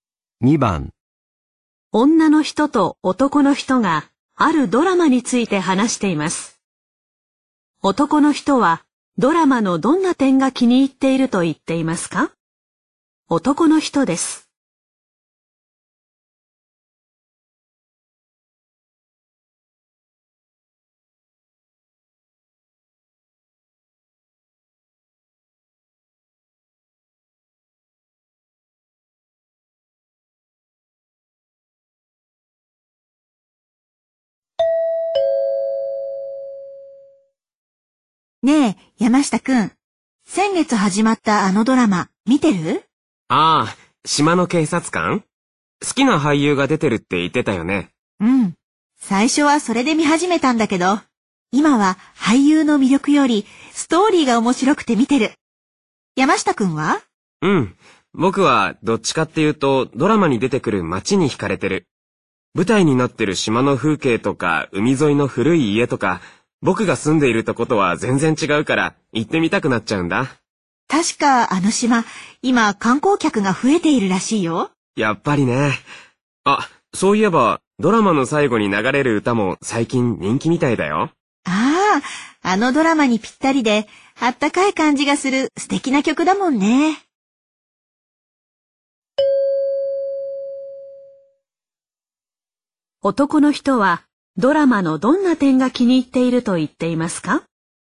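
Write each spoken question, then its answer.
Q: 男の人はドラマのどんな点が気に入っていると言っていますか?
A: 舞台になっている島の風景や街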